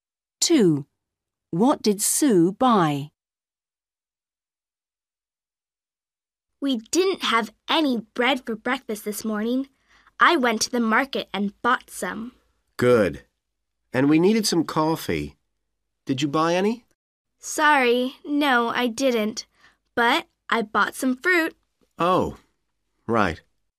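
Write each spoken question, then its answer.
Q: What did Sue buy?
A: bread and fruit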